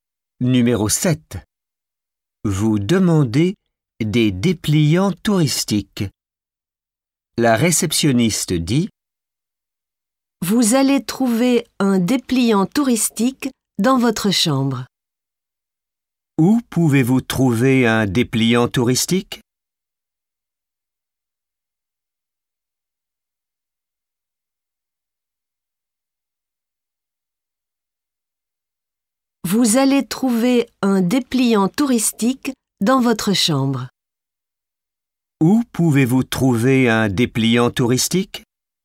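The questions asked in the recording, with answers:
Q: Où pouvez-vous trouver un dépliant touristique ?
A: Dans votre chambre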